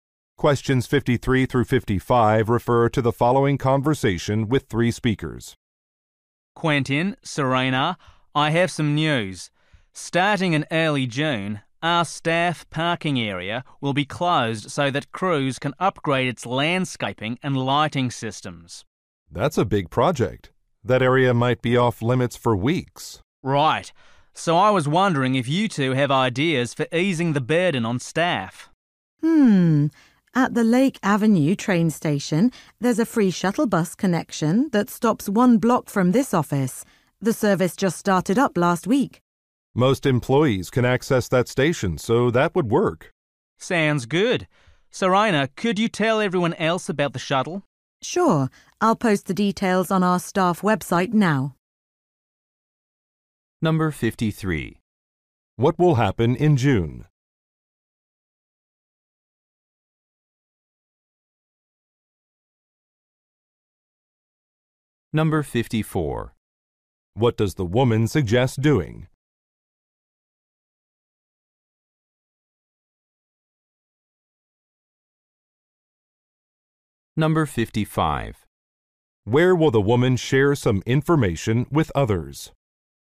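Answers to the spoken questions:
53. The staff parking area will close
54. Using the free shuttle bus from Lake Avenue train station
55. On the staff website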